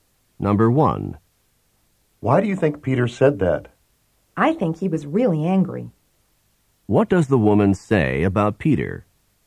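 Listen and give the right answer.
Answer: She thinks he was really angry.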